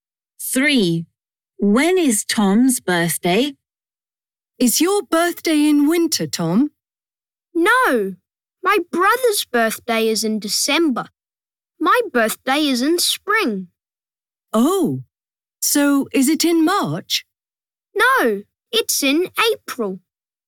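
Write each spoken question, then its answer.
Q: When is Tom's birthday?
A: In April.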